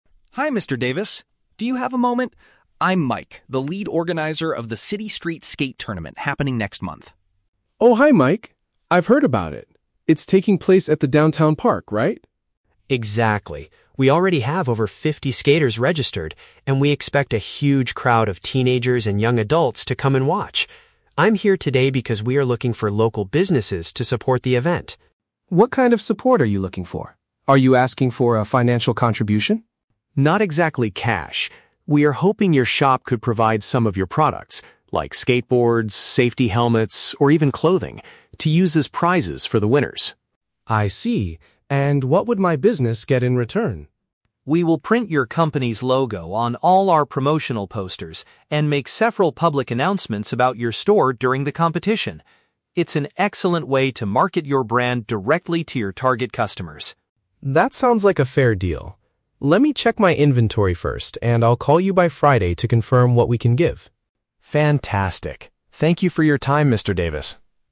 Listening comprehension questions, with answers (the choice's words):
Listen to the conversation between an event organizer and a shop owner. Choose the correct answer (A, B, or C) for each question.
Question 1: What is Mike asking Mr. Davis to do?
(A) To donate physical items to reward the top competitors.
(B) To give money to help build a new skate park downtown.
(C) To register as a judge for the upcoming skateboarding tournament.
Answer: To donate physical items to reward the top competitors.

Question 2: Who is the expected audience for the competition?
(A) Professional athletes from different cities.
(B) Mostly younger people from the local area.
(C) Local business owners and their families.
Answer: Mostly younger people from the local area.

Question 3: How will the sports shop benefit from this agreement?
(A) They will be allowed to sell their products inside the park.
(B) They will receive a percentage of the event's ticket sales.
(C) They will get public recognition and visual advertising.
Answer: They will get public recognition and visual advertising.

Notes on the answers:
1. Mike says, "We are hoping your shop could provide some of your products... to use as prizes for the winners." Option A perfectly paraphrases this: "donate physical items" (provide products) to "reward the top competitors" (prizes for the winners). Why the traps are wrong: Option B is a trap; Mr. Davis asks about a "financial contribution" (money), but Mike explicitly says "Not exactly cash." Option C is plausible, but Mike is asking for sponsorships, not judges.
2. Mike mentions that they expect a "huge crowd of teenagers and young adults to come and watch." Option B matches this by saying "mostly younger people." Why the traps are wrong: Option A is not mentioned; the participants are local skaters, not professionals from other cities. Option C is a trap; Mike is talking to a local business owner, but the audience watching the event is teenagers.
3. Mike promises to print the shop's "logo on all our promotional posters" (visual advertising) and make "public announcements" (public recognition). Why the traps are wrong: Option A is a very common real-world sponsorship benefit, but it is never mentioned in the audio. Option B is also a trap; the conversation is about trading products for marketing, not sharing money/ticket sales.

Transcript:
Mike: Hi, Mr. Davis. Do you have a moment? I'm Mike, the lead organizer of the City Street Skate Tournament happening next month.
Mr. Davis: Oh, hi Mike. I've heard about it. It's taking place at the downtown park, right?
Mike: Exactly. We already have over fifty skaters registered, and we expect a huge crowd of teenagers and young adults to come and watch. I'm here today because we are looking for local businesses to support the event.
Mr. Davis: What kind of support are you looking for? Are you asking for a financial contribution?
Mike: Not exactly cash. We are hoping your shop could provide some of your products—like skateboards, safety helmets, or even clothing—to use as prizes for the winners.
Mr. Davis: I see. And what would my business get in return?
Mike: We will print your company's logo on all our promotional posters and make several public announcements about your store during the competition. It's an excellent way to market your brand directly to your target customers.
Mr. Davis: That sounds like a fair deal. Let me check my inventory first, and I'll call you by Friday to confirm what we can give.
Mike: Fantastic! Thank you for your time, Mr. Davis.